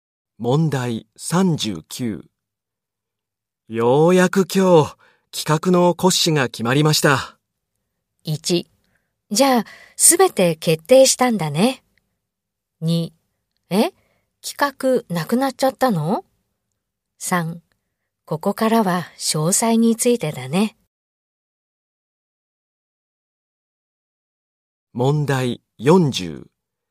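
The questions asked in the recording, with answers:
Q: ようやく今日、企画の骨子が決まりました。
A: 3: ここからは詳細についてだね。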